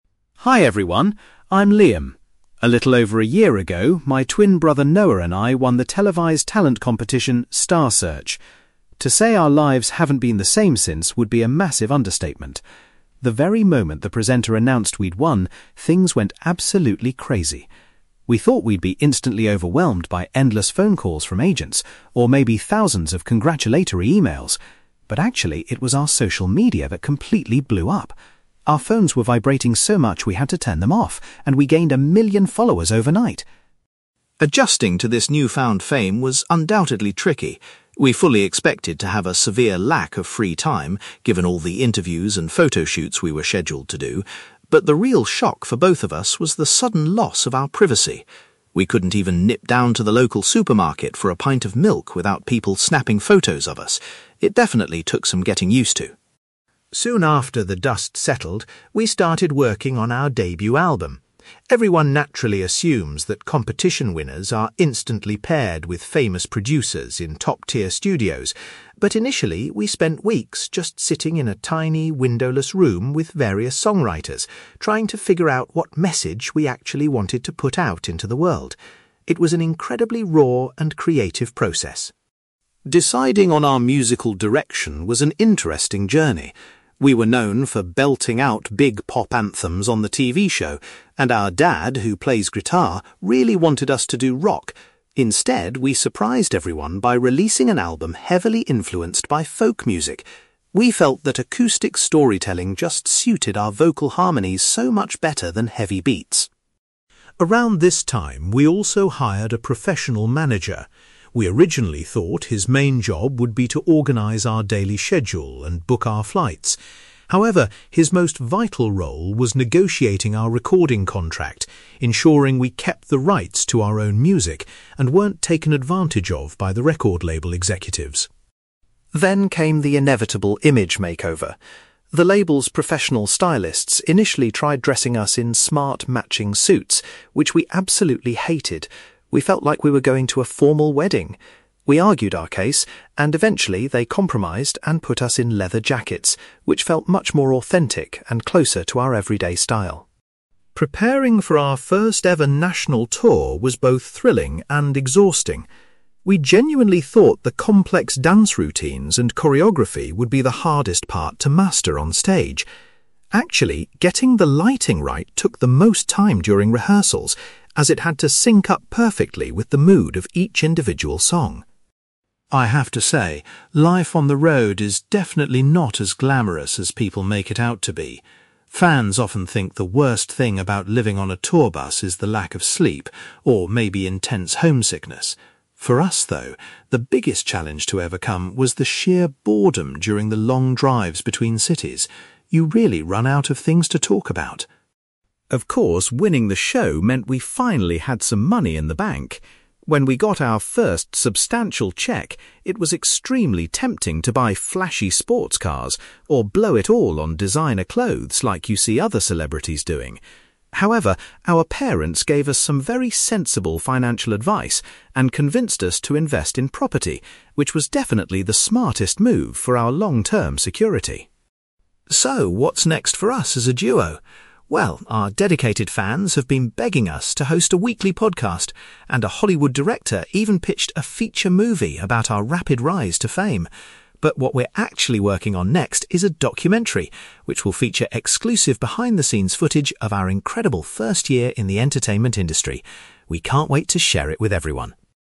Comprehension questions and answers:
You will hear a young man called Liam talking about the career he and his twin brother have had since winning a television talent show. For questions 9-18, complete the sentences with a word or short phrase.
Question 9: Liam was surprised that their (9)........................... experienced the biggest immediate reaction after their victory.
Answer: social media

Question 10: Liam says the brothers were unprepared for losing their (10)........................... when they became famous.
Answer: privacy

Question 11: At the beginning of the album creation process, the twins collaborated with a number of (11)........................... .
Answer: songwriters

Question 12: The brothers shocked the public when their first album featured the style of (12)........................... .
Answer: folk music

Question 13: According to Liam, their manager's most important contribution was securing a good (13)........................... for them.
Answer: contract

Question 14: The twins rejected the formal clothes chosen by stylists and opted to wear (14)........................... instead.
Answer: leather jackets

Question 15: During the tour preparations, the twins found that perfecting the (15)........................... was the most time-consuming task.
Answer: lighting

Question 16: Liam reveals that dealing with (16)........................... was the most difficult aspect of travelling on the tour bus.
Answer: boredom

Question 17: Rather than purchasing expensive vehicles or fashion items, the twins decided to put their money into (17)........................... .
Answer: property

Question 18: Liam confirms that the duo's upcoming media project will be a (18)........................... about their recent experiences.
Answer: documentary

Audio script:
Liam: Hi everyone, I'm Liam. A little over a year ago, my twin brother Noah and I won the televised talent competition, 'Star Search'. To say our lives haven't been the same since would be a massive understatement! The very moment the presenter announced we'd won, things went absolutely crazy. We thought we'd be instantly overwhelmed by endless phone calls from agents, or maybe thousands of congratulatory emails. But actually, it was our social media that completely blew up. Our phones were vibrating so much we had to turn them off, and we gained a million followers overnight!
Adjusting to this newfound fame was undoubtedly tricky. We fully expected to have a severe lack of free time, given all the interviews and photoshoots we were scheduled to do. But the real shock for both of us was the sudden loss of our privacy. We couldn't even nip down to the local supermarket for a pint of milk without people snapping photos of us. It definitely took some getting used to.
Soon after the dust settled, we started working on our debut album. Everyone naturally assumes that competition winners are instantly paired with famous producers in top-tier studios. But initially, we spent weeks just sitting in a tiny, windowless room with various songwriters, trying to figure out what message we actually wanted to put out into the world. It was an incredibly raw and creative process.
Deciding on our musical direction was an interesting journey. We were known for belting out big pop anthems on the TV show, and our dad, who plays guitar, really wanted us to do rock. Instead, we surprised everyone by releasing an album heavily influenced by folk music. We felt that acoustic storytelling just suited our vocal harmonies so much better than heavy beats.
Around this time, we also hired a professional manager. We originally thought his main job would be to organize our daily schedule and book our flights. However, his most vital role was negotiating our recording contract, ensuring we kept the rights to our own music and weren't taken advantage of by the record label executives.
Then came the inevitable image makeover. The label's professional stylists initially tried dressing us in smart, matching suits, which we absolutely hated. We felt like we were going to a formal wedding! We argued our case, and eventually, they compromised and put us in leather jackets, which felt much more authentic and closer to our everyday style.
Preparing for our first ever national tour was both thrilling and exhausting. We genuinely thought the complex dance routines and choreography would be the hardest part to master on stage. Actually, getting the lighting right took the most time during rehearsals, as it had to sync up perfectly with the mood of each individual song.
I have to say, life on the road is definitely not as glamorous as people make it out to be. Fans often think the worst thing about living on a tour bus is the lack of sleep, or maybe intense homesickness. For us, though, the biggest challenge to overcome was the sheer boredom during the long drives between cities. You really run out of things to talk about!
Of course, winning the show meant we finally had some money in the bank. When we got our first substantial cheque, it was extremely tempting to buy flashy sports cars or blow it all on designer clothes, like you see other celebrities doing. However, our parents gave us some very sensible financial advice and convinced us to invest in property, which was definitely the smartest move for our long-term security.
So, what's next for us as a duo? Well, our dedicated fans have been begging us to host a weekly podcast, and a Hollywood director even pitched a feature movie about our rapid rise to fame. But what we're actually working on next is a documentary, which will feature exclusive behind-the-scenes footage of our incredible first year in the entertainment industry. We can't wait to share it with everyone.

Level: B2